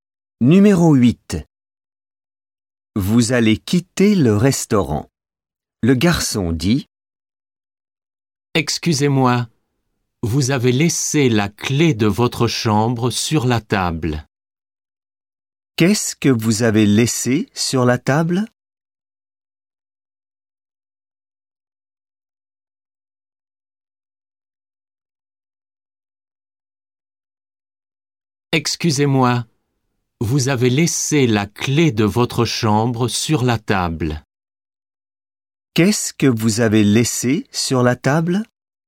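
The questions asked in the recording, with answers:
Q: Qu'est-ce que vous avez laissé sur la table?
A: La clé de votre chambre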